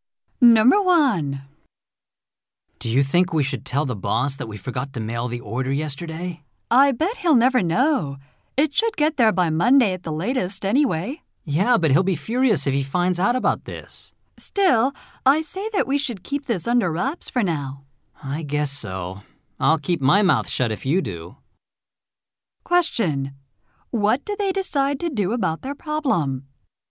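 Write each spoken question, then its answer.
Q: What do they decide to do about their problem?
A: Keep it secret from the boss for now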